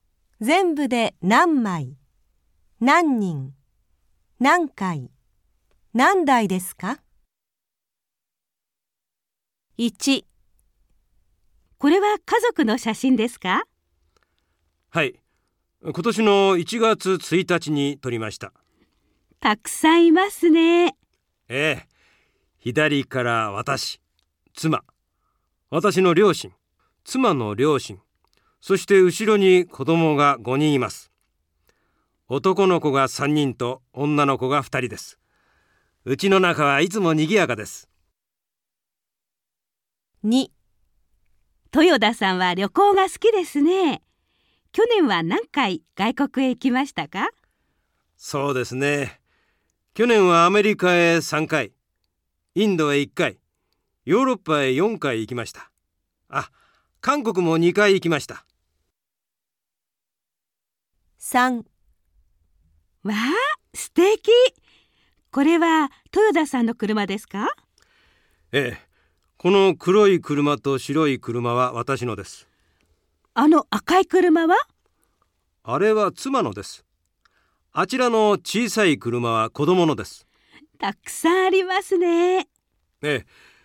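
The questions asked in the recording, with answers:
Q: 全部で何枚、何人、何回、何台ですか?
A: 11人

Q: 去年は何回外国へ行きましたか?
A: 10回

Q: 全部で何枚、何人、何回、何台ですか?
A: 4台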